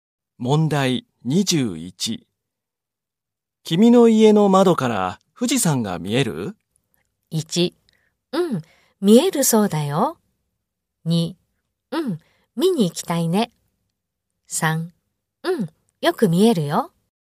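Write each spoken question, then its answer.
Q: 君の家の窓から富士山が見える?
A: 3: うん、よく見えるよ。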